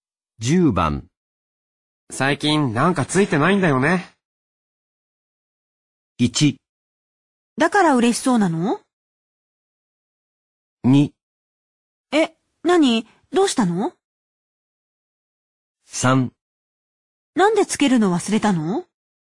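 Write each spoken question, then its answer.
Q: 最近なんかついてないんだよね。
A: 2: え、何?どうしたの?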